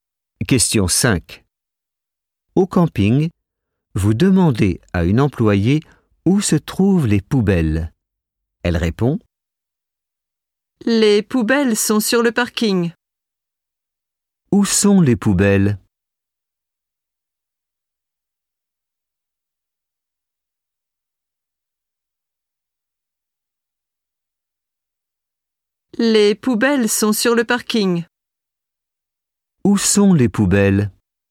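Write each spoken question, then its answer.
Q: Où sont les poubelles?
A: sur le parking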